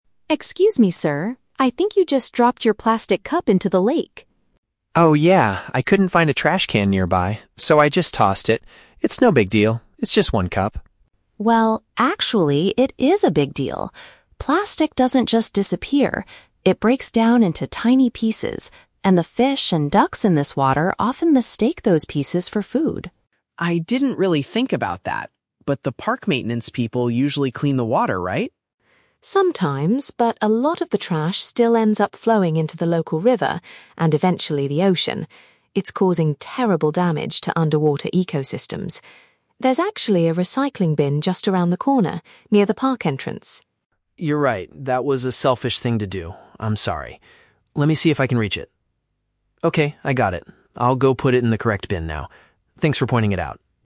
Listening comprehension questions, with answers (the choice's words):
Listen to a conversation between two people in a park and choose the correct answer (A, B, or C) for each question.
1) Why does the woman start a conversation with the man?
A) Because she wants to ask for directions to the park entrance.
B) Because she saw him throwing his rubbish into the water.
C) Because she accidentally dropped her own cup in the lake.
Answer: Because she saw him throwing his rubbish into the water.

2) According to the woman, what is the main danger of the plastic cup?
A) The animals living in the lake might eat it by accident.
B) It takes a very long time for the park staff to clean it up.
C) It will make the local recreation area look extremely dirty.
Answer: The animals living in the lake might eat it by accident.

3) What does the man promise to do at the end of the conversation?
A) Never bring single-use plastic items to the park again.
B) Wait by the lake for the maintenance workers to arrive.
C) Retrieve his trash and dispose of it in the proper place.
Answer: Retrieve his trash and dispose of it in the proper place.

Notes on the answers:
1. Emily stops the man because he "dropped your plastic cup into the lake." (Paraphrasing: throwing his rubbish = dropped plastic cup; into the water = into the lake).
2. Emily explains that the plastic breaks down and "the fish and ducks in this water often mistake those pieces for food." (Paraphrasing: animals = fish and ducks; eat it by accident = mistake pieces for food).
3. Jason says, "Let me see if I can reach it... Okay, I got it. I'll go put it in the correct bin now." (Paraphrasing: retrieve his trash = reach it / I got it; dispose of it in the proper place = put it in the correct bin).

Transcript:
Emily: Excuse me, sir? I think you just dropped your plastic cup into the lake.
Jason: Oh, yeah. I couldn't find a trash can nearby, so I just tossed it. It's no big deal, it's just one cup.
Emily: Well, actually, it is a big deal. Plastic doesn't just disappear. It breaks down into tiny pieces, and the fish and ducks in this water often mistake those pieces for food.
Jason: I didn't really think about that. But the park maintenance people usually clean the water, right?
Emily: Sometimes, but a lot of the trash still ends up flowing into the local river and eventually the ocean. It's causing terrible damage to underwater ecosystems. There's actually a recycling bin just around the corner, near the park entrance.
Jason: You're right, that was a selfish thing to do. I'm sorry. Let me see if I can reach it... Okay, I got it. I'll go put it in the correct bin now. Thanks for pointing it out.